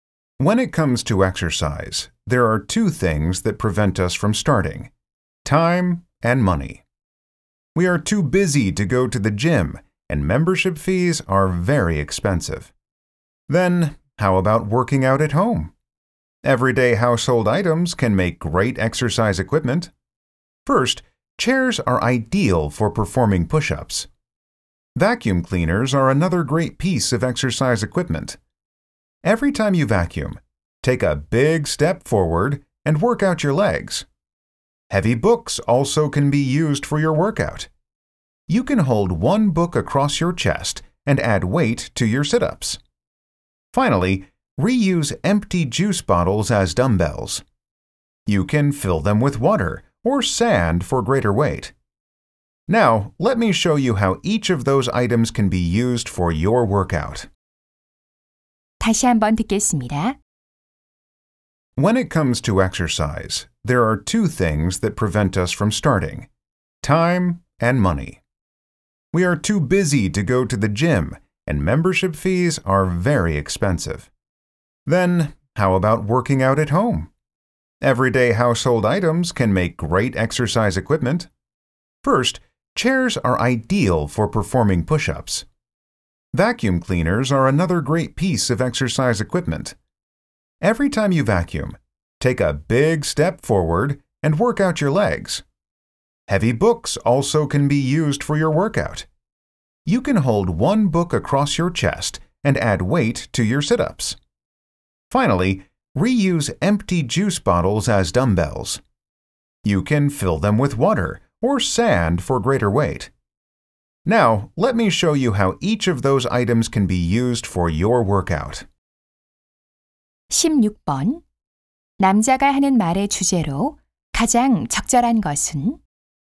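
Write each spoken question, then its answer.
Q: 남자가 하는 말의 주제로 가장 적절한 것은?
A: 가정용품을 운동 기구로 활용하는 방법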